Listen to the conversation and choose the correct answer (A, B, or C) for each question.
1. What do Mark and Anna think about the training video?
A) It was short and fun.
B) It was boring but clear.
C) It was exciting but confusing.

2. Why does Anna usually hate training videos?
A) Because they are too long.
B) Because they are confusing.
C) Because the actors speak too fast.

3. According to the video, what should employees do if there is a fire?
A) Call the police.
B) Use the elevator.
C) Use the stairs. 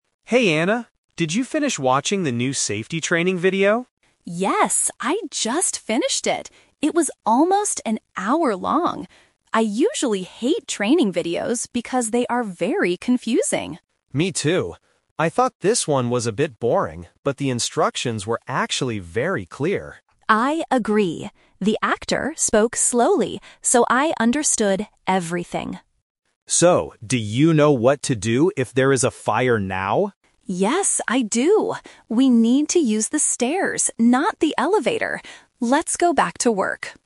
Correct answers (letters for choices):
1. B
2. B
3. C

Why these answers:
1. Mark says, "I thought this one was a bit boring, but the instructions were actually very clear." Option A and C use opposite adjectives that do not match the speakers' opinions. Option C uses "confusing", which is the trap (Anna says training videos are usually confusing, but not this one).
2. Anna clearly states, "I usually hate training videos because they are very confusing." Option A is the trap because although this specific video is long ("almost an hour long"), it is not the reason she usually hates them. Option C is the trap because the actor in this video "spoke slowly".
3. Anna says, "We need to use the stairs, not the elevator." Option B is the trap because the elevator is mentioned but specifically rejected ("not the elevator"). Option A is not mentioned.

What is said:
Mark: Hey Anna, did you finish watching the new safety training video?
Anna: Yes, I just finished it. It was almost an hour long! I usually hate training videos because they are very confusing.
Mark: Me too. I thought this one was a bit boring, but the instructions were actually very clear.
Anna: I agree. The actor spoke slowly, so I understood everything.
Mark: So, do you know what to do if there is a fire now?
Anna: Yes, I do. We need to use the stairs, not the elevator. Let's go back to work.